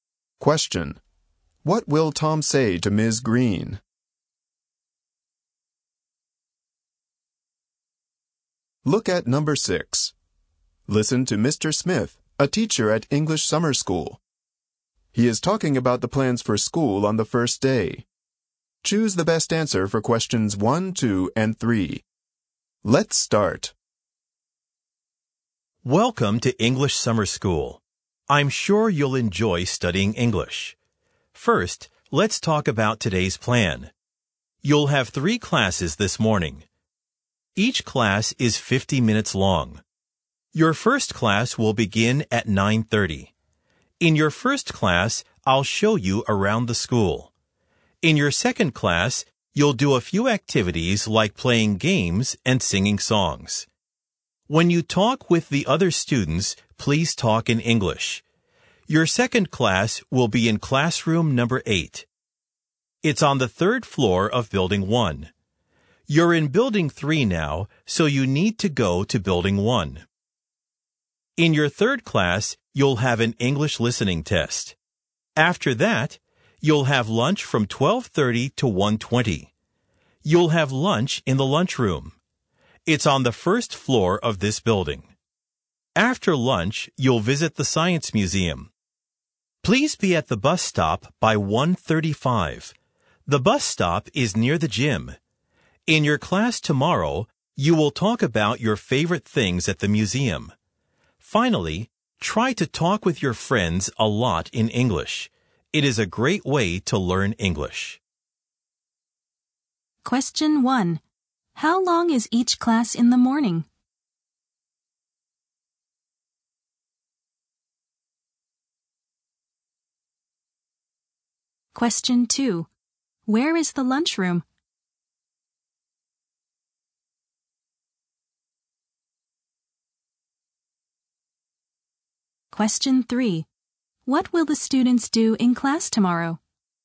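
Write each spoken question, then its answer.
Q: How long is each class in the morning?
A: 50 minutes

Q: Where is the lunchroom?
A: On the first floor of Building 3

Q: What will the students do in class tomorrow?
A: Talk about their favorite things at the museum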